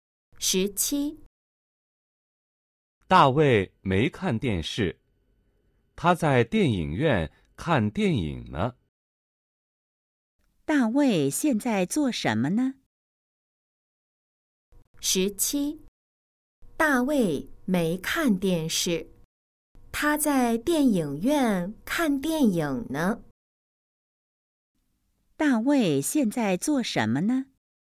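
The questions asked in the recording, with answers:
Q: 大卫现在做什么呢?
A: 在电影院看电影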